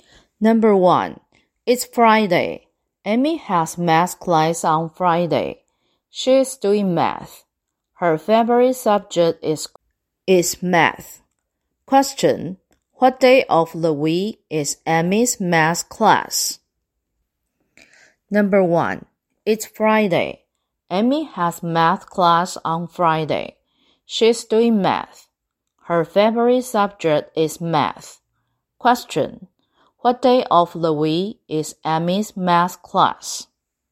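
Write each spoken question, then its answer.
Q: Question, what day of the week is Amy's math class?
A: Friday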